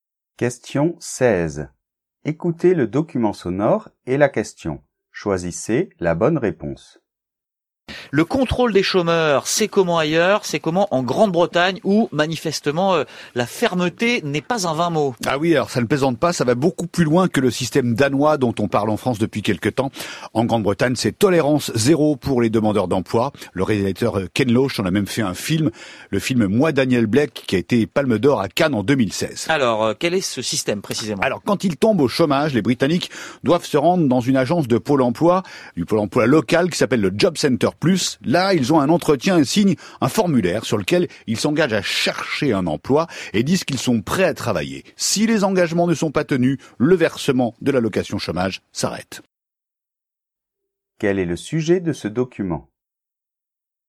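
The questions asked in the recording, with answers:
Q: Quel est le sujet de ce document ?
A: Le contrôle des chômeurs en Grande-Bretagne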